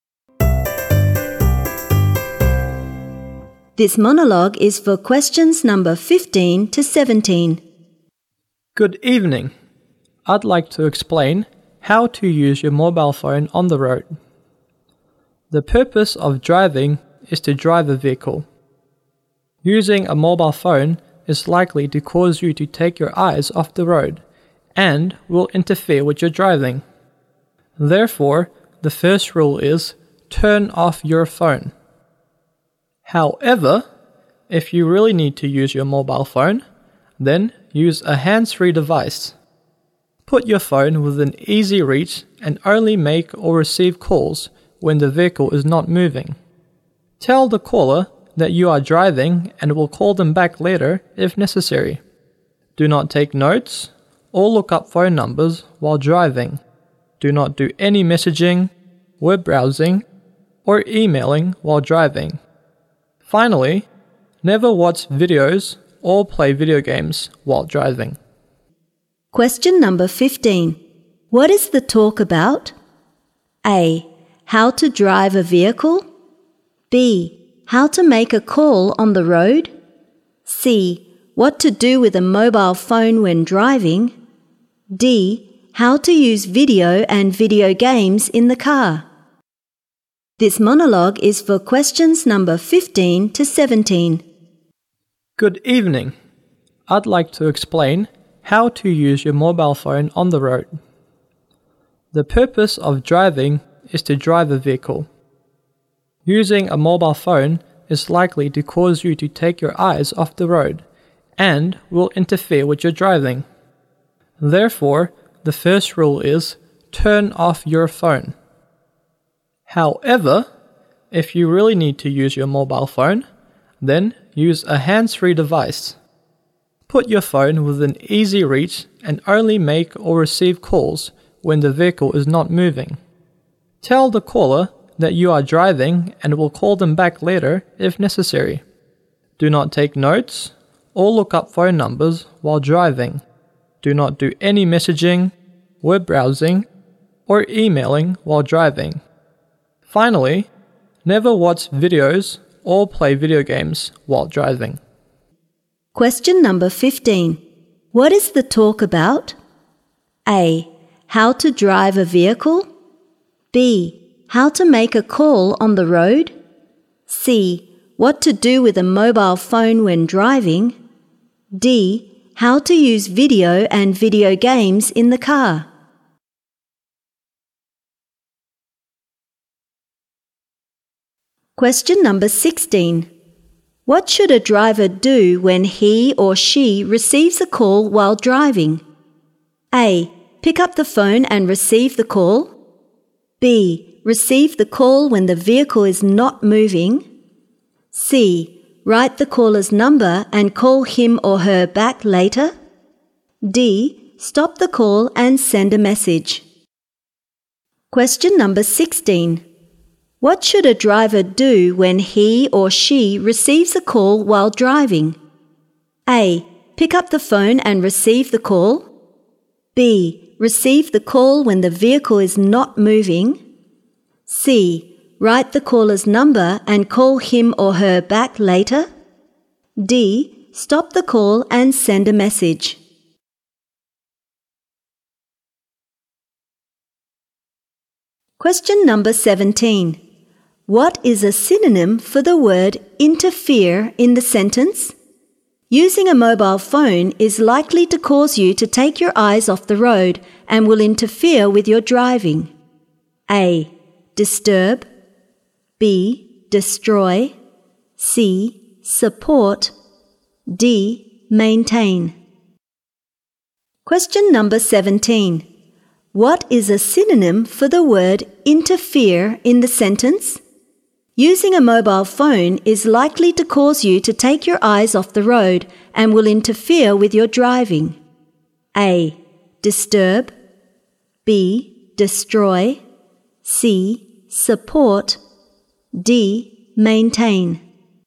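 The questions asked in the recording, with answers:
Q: What is the talk about?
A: C: What to do with a mobile phone when driving?

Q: What should a driver do when he or she receives a call while driving?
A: B: Receive the call when the vehicle is not moving.

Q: What is a synonym for the word interfere in the sentence?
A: A: Disturb.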